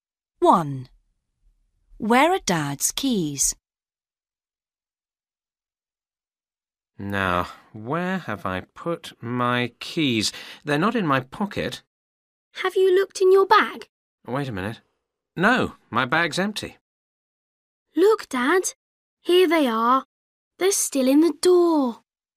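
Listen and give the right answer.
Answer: in the door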